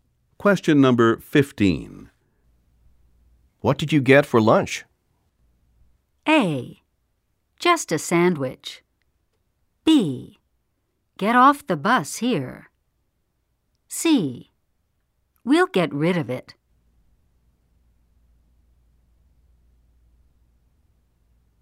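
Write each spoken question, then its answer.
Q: What did you get for lunch?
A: A: Just a sandwich.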